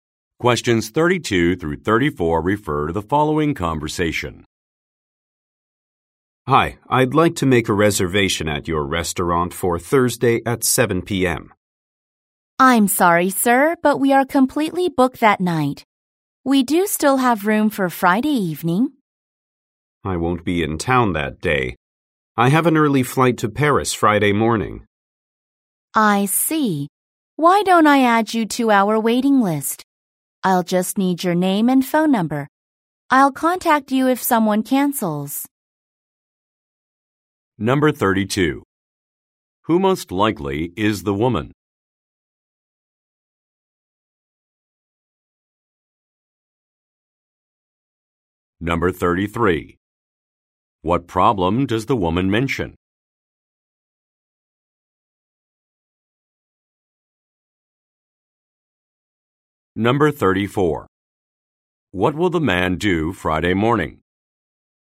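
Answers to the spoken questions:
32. A restaurant employee
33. The restaurant is fully booked Thursday
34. Take a flight to Paris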